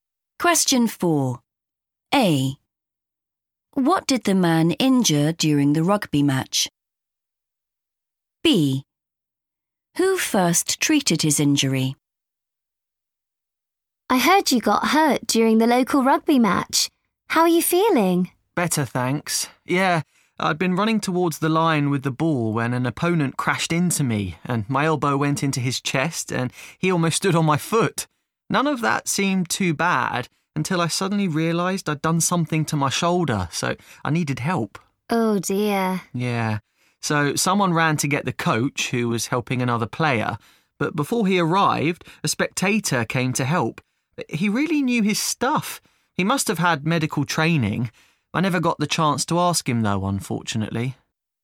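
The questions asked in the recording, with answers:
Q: What did the man injure during the rugby match?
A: his shoulder

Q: Who first treated his injury?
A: a spectator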